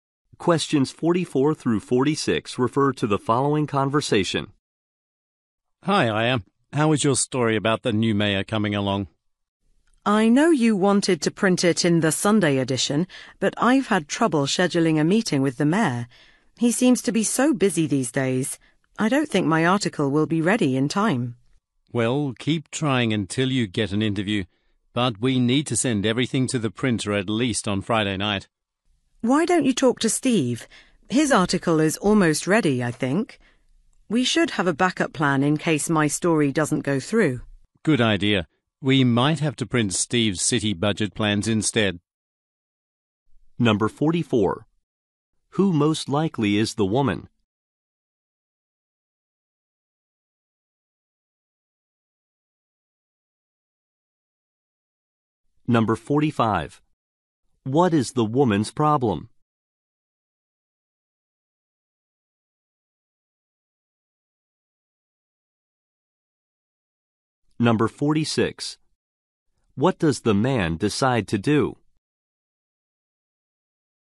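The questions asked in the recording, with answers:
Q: Who most likely is the woman?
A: A newspaper reporter

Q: What is the woman's problem?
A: She can't schedule a meeting with the mayor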